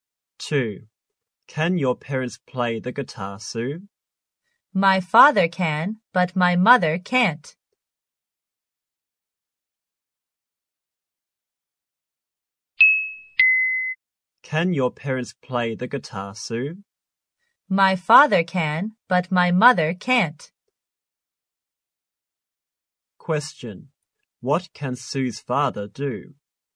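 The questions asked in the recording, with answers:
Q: What can Sue's father do?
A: Play the guitar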